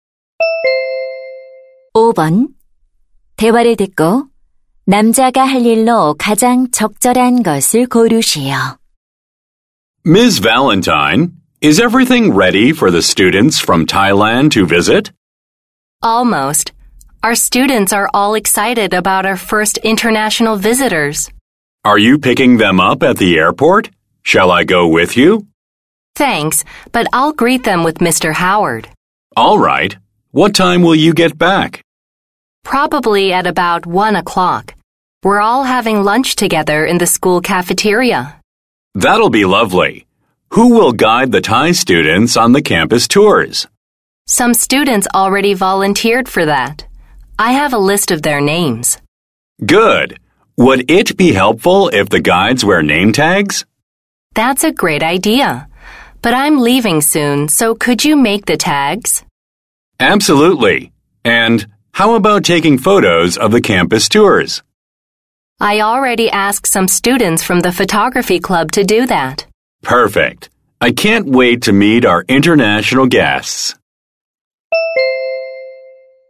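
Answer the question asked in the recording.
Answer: 안내 학생들의 이름표 만들기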